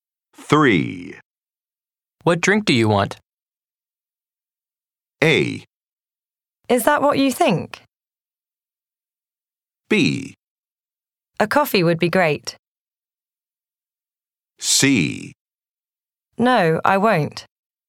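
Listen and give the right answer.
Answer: B: A coffee would be great.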